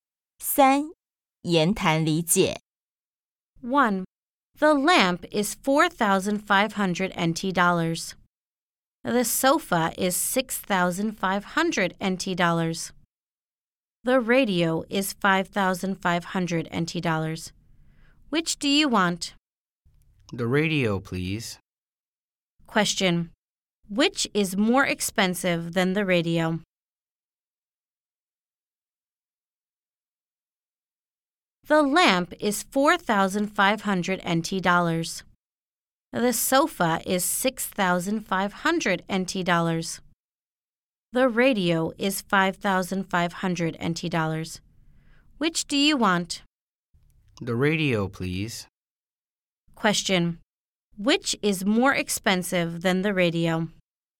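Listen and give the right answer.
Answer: The sofa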